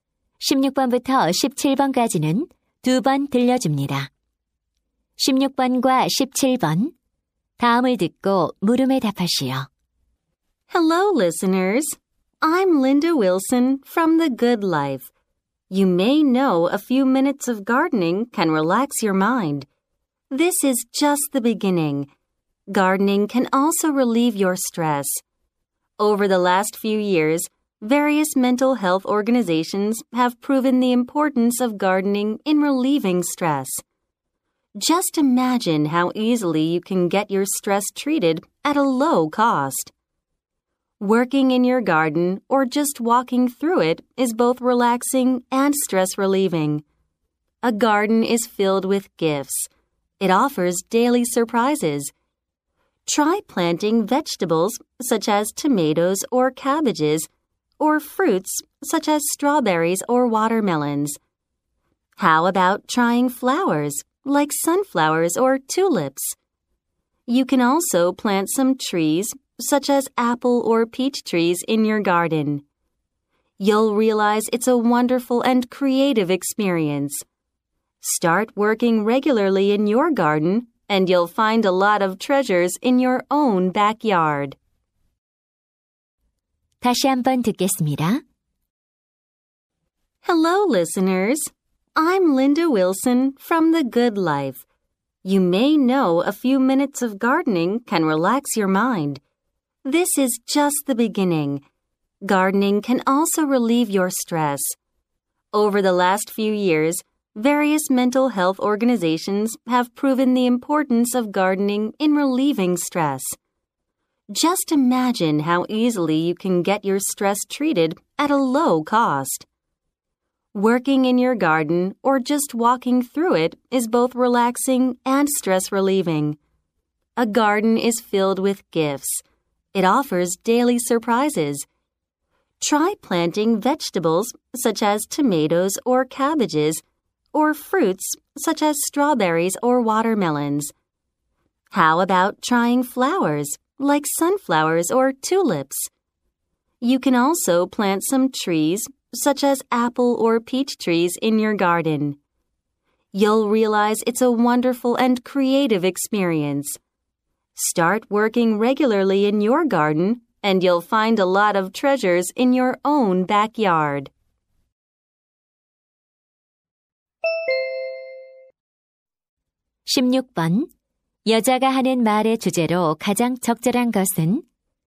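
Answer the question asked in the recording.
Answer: 정원 가꾸기의 스트레스 해소 효과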